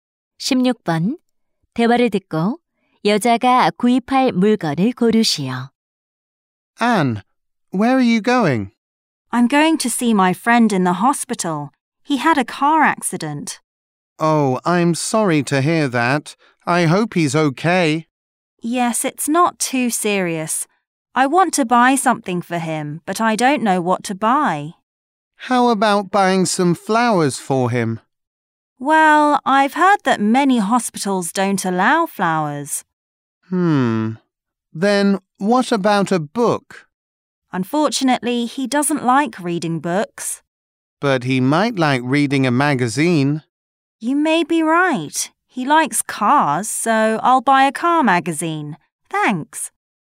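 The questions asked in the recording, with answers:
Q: 대화를 듣고 여자가 구입할 물건을 고르시오.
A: 자동차 잡지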